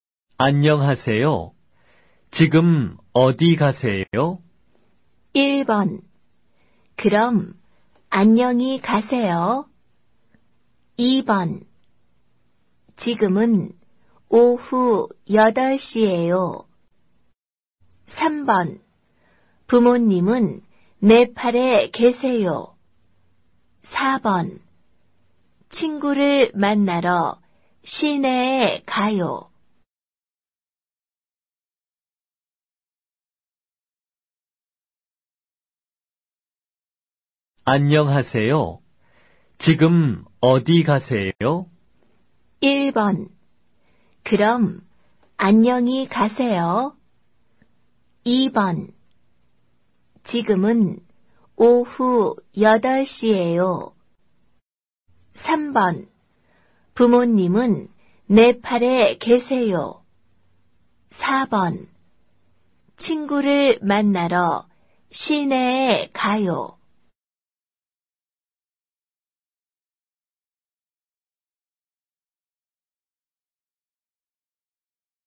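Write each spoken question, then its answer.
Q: 안녕하세요. 지금 어디 가세요?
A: 4: 친구를 만나러 시내에 가요.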